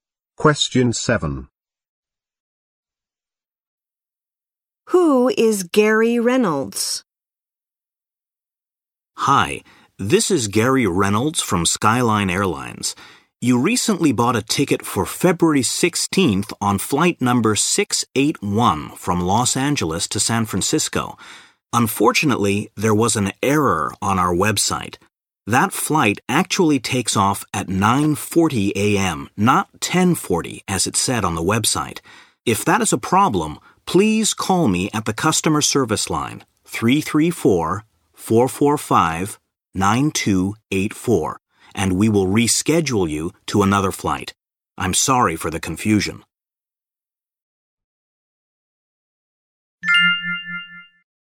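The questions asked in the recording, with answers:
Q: Who is Gary Reynolds?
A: An employee of Skyline Airlines (customer service)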